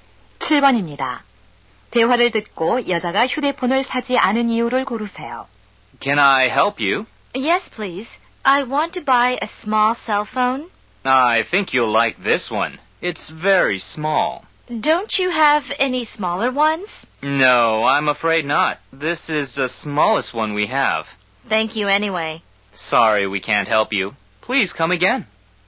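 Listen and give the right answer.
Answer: 더 작은 휴대폰이 없어서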